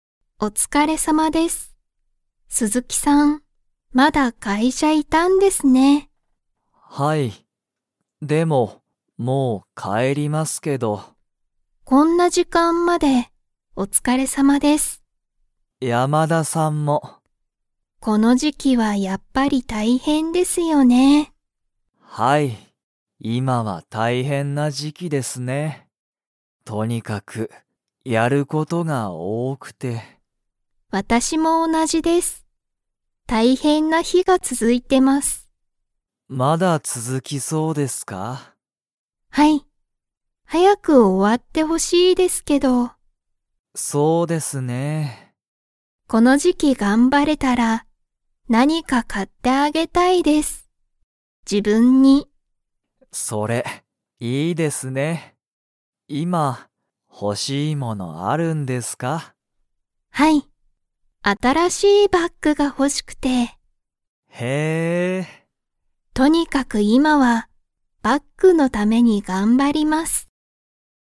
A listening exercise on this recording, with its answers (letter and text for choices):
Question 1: 今いまは大変たいへんな時期じきですか?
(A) はい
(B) いいえ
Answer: (A) はい

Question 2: 山田やまださんは、____が欲ほしい。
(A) こんな日ひ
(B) 買かわない物もの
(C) 新あたらしいバッグ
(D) 大変たいへんな時期じき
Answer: (C) 新あたらしいバッグ

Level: Level 2